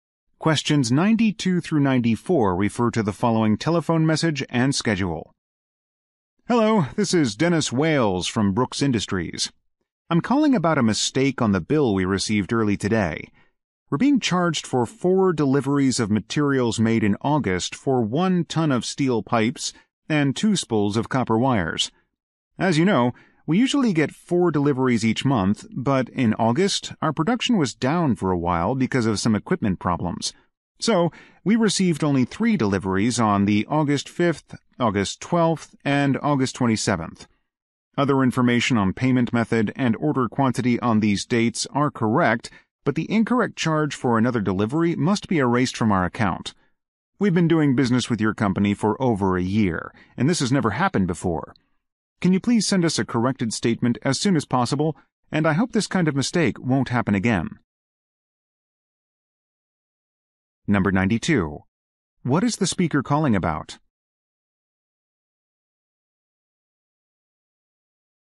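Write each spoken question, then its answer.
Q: What is the speaker calling about?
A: A billing mistake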